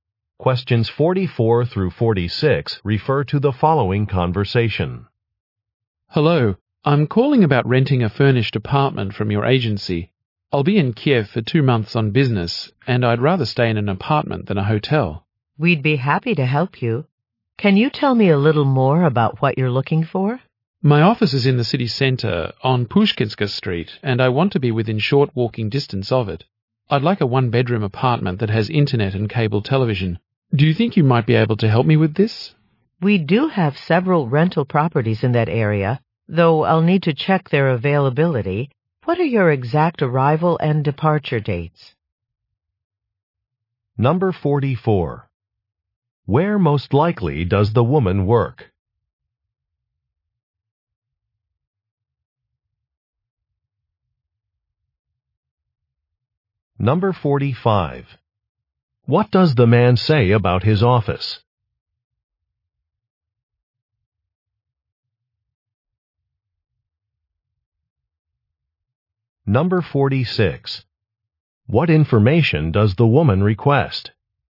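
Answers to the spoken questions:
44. At a rental agency
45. It is in the city center on Pushkinska Street
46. His exact arrival and departure dates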